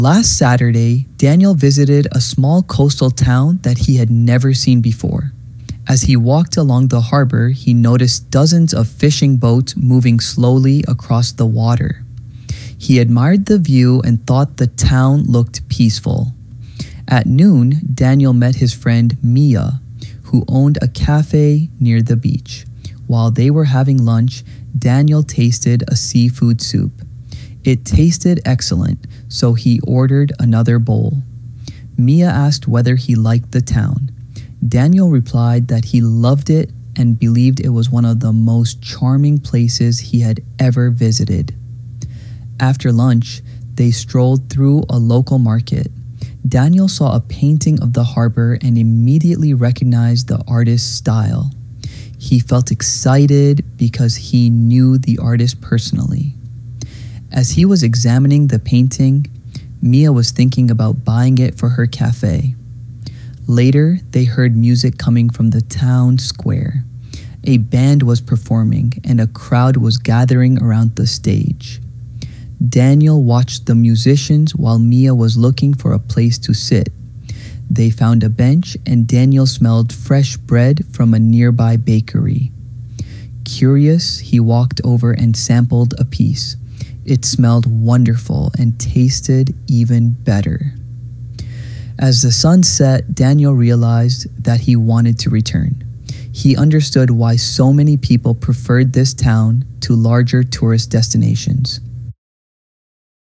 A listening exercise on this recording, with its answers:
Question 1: Why did Daniel visit the coastal town?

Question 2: What did Daniel notice at the harbor?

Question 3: Who did Daniel meet at noon?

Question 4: What business did Mia own?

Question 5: What did Daniel think of the seafood soup?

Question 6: Why was Daniel excited when he saw the painting?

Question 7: What was Mia considering buying?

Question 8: What was happening in the town square?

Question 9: What attracted Daniel to the bakery?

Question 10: What did Daniel decide at the end of the day?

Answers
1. Daniel wanted to visit the coastal town because he wanted to see a place he had never visited.
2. He noticed fishing boats moving slowly across the water
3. At noon, Daniel met his friend Mia
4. Mia owned a café near the beach.
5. He thought it tasted excellent.
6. Daniel was excited when he saw the painting because he knew the artist personally.
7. Mia considered buying the painting
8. A band was performing in the town square
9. Daniel was attracted to the bakery by the smell of fresh bread
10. At the end of the day Daniel decided to return to the coastal town someday

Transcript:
Last Saturday, Daniel visited a small coastal town that he had never seen before. As he walked along the harbor, he noticed dozens of fishing boats moving slowly across the water. He admired the view and thought the town looked peaceful.
At noon, Daniel met his friend Mia, who owned a café near the beach. While they were having lunch, Daniel tasted a seafood soup. It tasted excellent, so he ordered another bowl. Mia asked whether he liked the town. Daniel replied that he loved it and believed it was one of the most charming places he had ever visited.
After lunch, they strolled through a local market. Daniel saw a painting of the harbor and immediately recognized the artist's style. He felt excited because he knew the artist personally. As he was examining the painting, Mia was thinking about buying it for her café.
Later, they heard music coming from the town square. A band was performing, and a crowd was gathering around the stage. Daniel watched the musicians while Mia was looking for a place to sit. They found a bench, and Daniel smelled fresh bread from a nearby bakery. Curious, he walked over and sampled a piece. It smelled wonderful and tasted even better.
As the sun set, Daniel realized that he wanted to return. He understood why so many people preferred this town to larger tourist destinations.